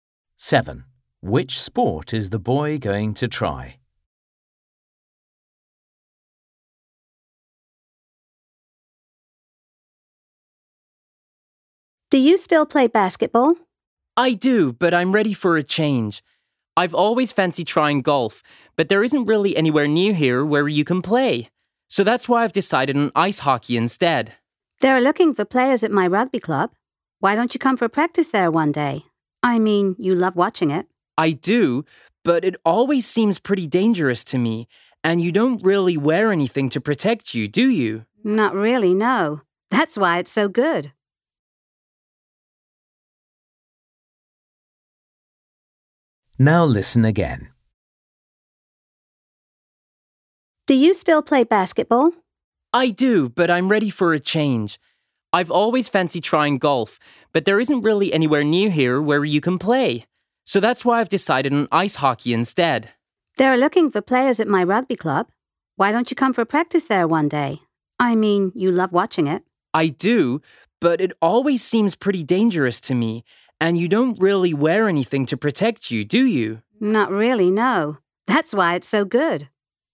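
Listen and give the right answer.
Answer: ice hockey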